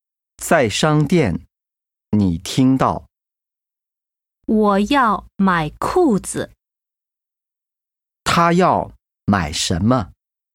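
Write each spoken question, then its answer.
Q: 他要买什么?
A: 裤子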